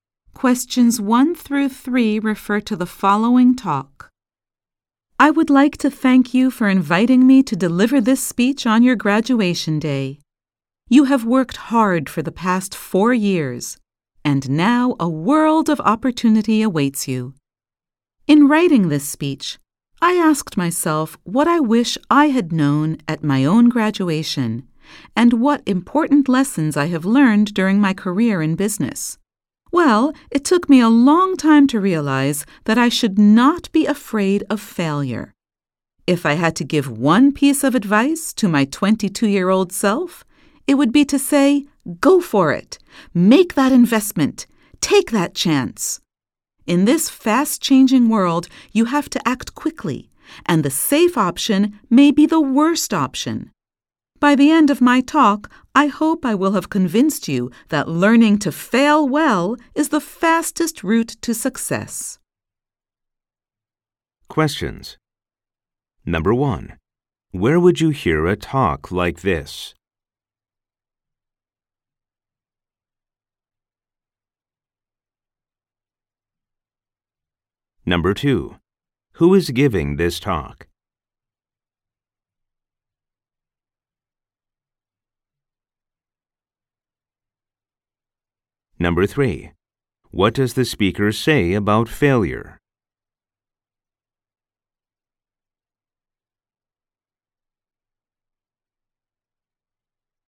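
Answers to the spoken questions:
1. At a graduation ceremony
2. A businessperson invited to give a graduation speech
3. You should not be afraid of it; learning to fail well is the fastest route to success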